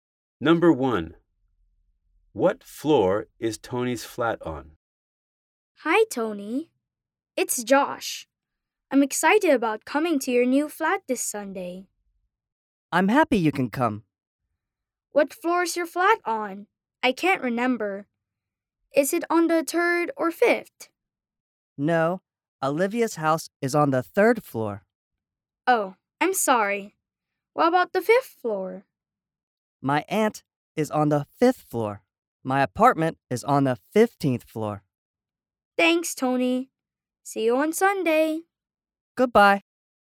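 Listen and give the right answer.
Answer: On the 15th floor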